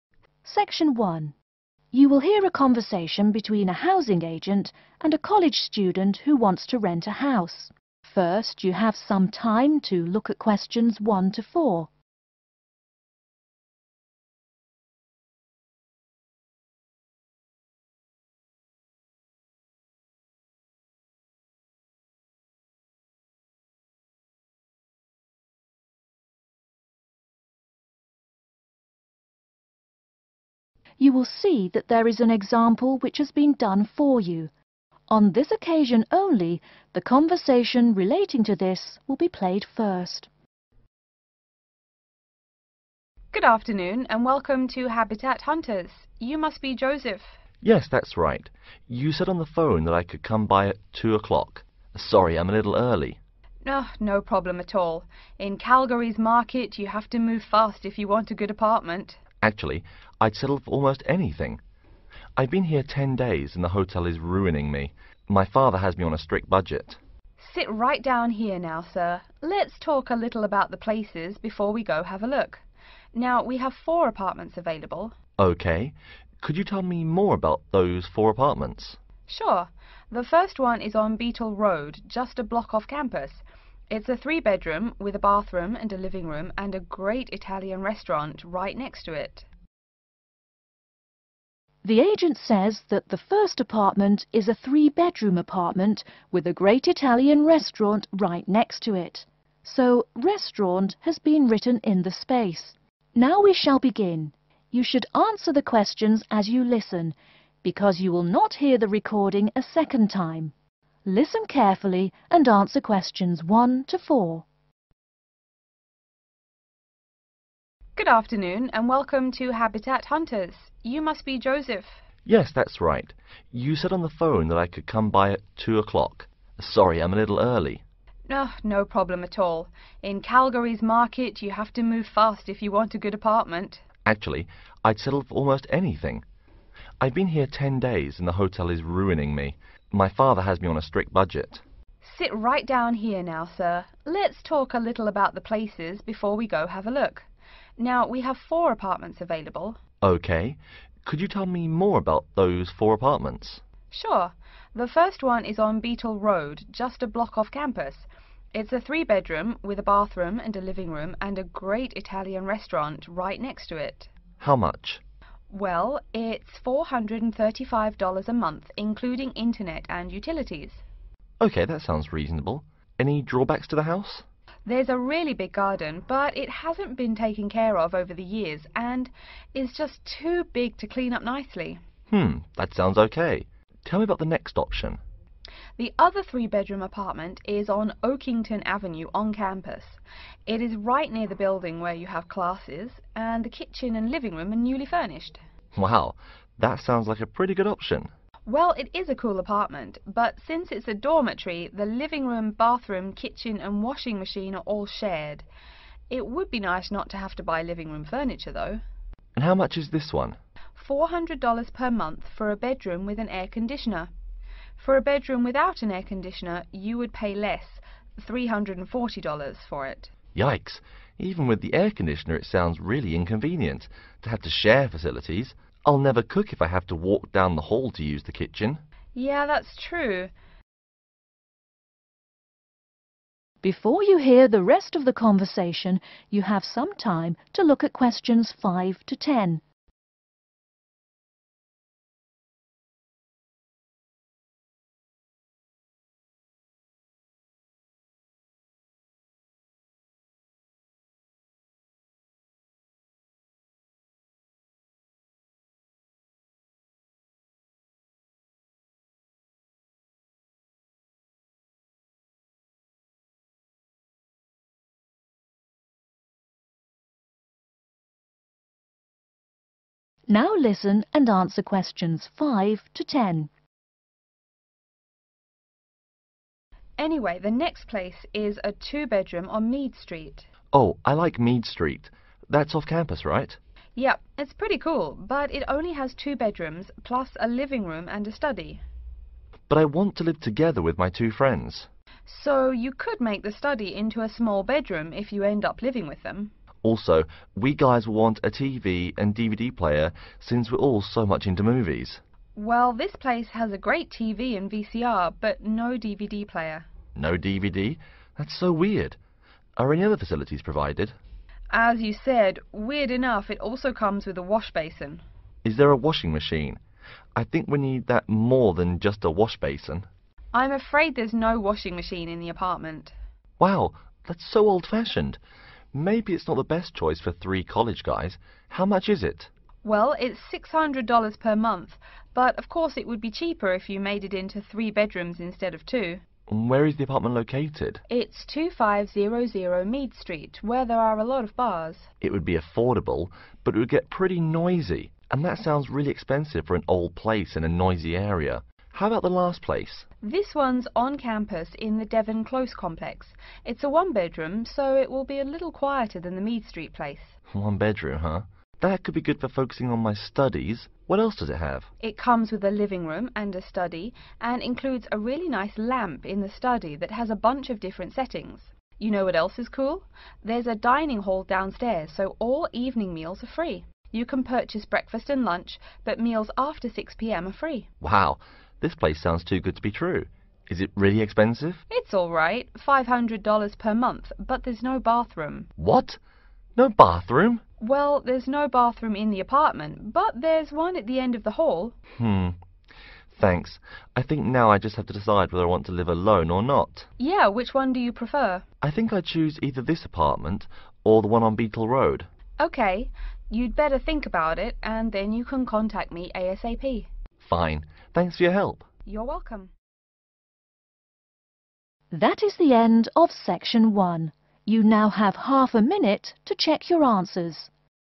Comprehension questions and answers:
Complete the table below. Write NO MORE THAN TWO WORDS AND/OR A NUMBER for each answer.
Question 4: seems 4.............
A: inconvenient

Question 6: a 6.............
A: washbasin

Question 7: quite 7.............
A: noisy

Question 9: free 9.............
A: evening meals